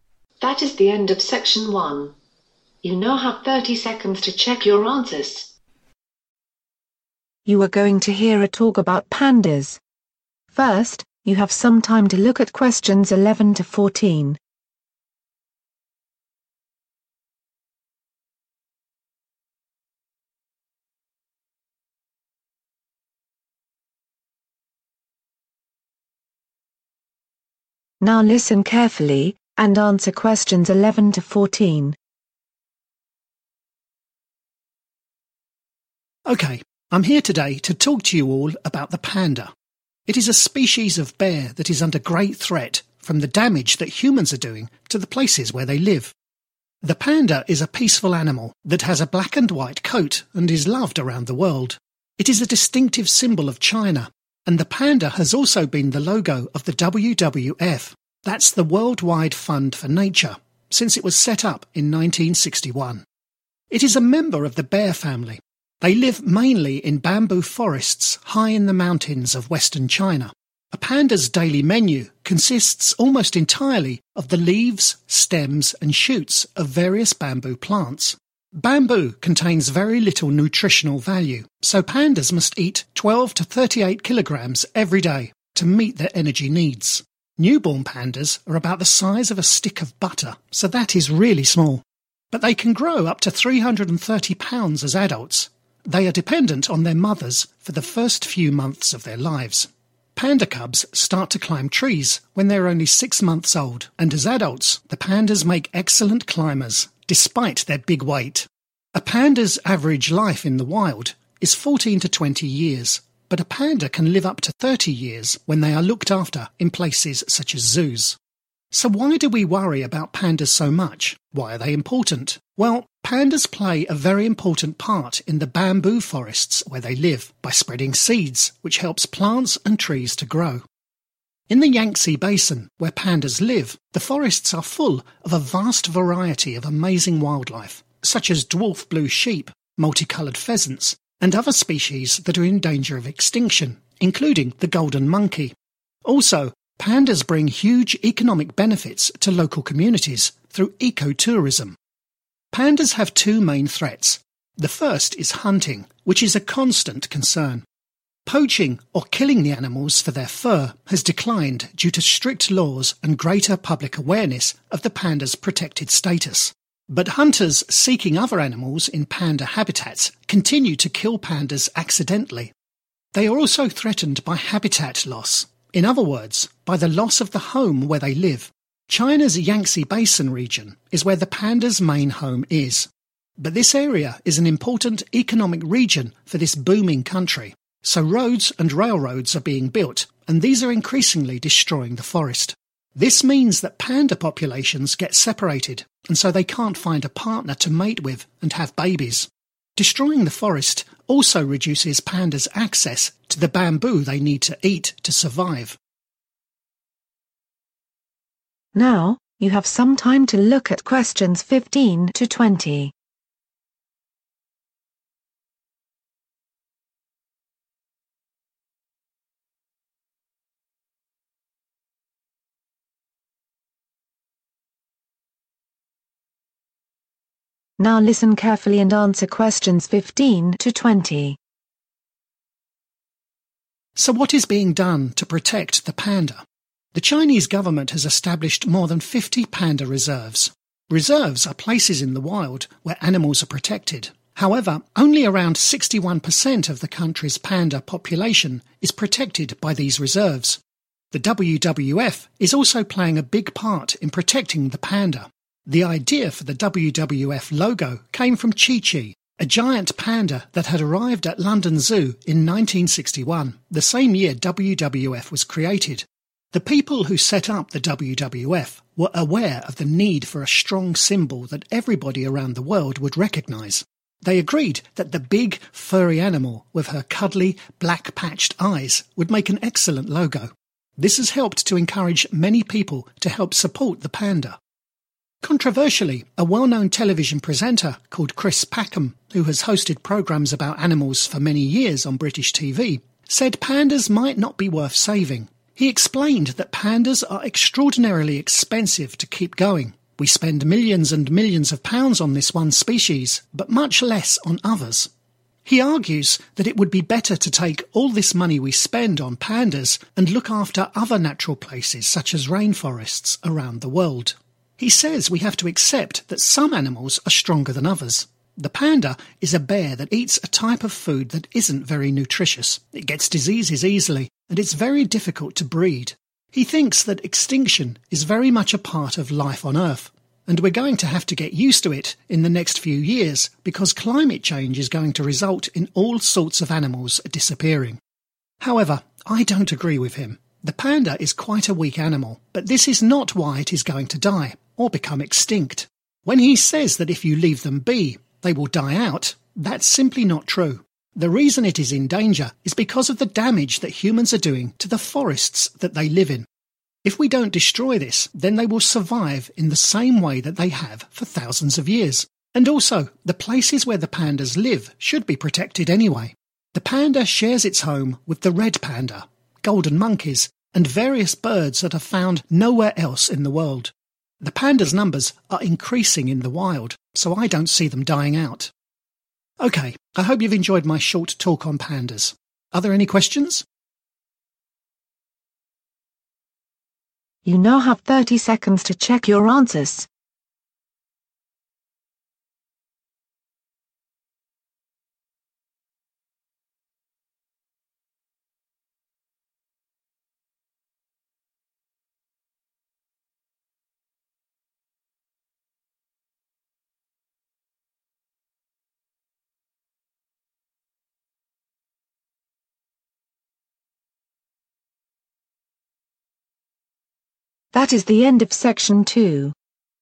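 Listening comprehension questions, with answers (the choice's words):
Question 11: Each day, pandas need to eat:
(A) Very little nutrition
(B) 12-38 kg of bamboo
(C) 330 pounds of bamboo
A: 12-38 kg of bamboo

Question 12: If pandas are cared for away from the wild, they can live for approximately:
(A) 6 months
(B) 14-20 years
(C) 30 years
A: 30 years

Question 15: What proportion of the panda population in China is protected by reserves?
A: around 61%

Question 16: What did the WWF create which encouraged people to support pandas?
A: a logo

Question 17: They are extremely (17).............. to look after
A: expensive

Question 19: They are in danger because (19)............ are damaging the forests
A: humans

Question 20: The number of pandas in the wild is (20)........... so they will not become extinct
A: increasing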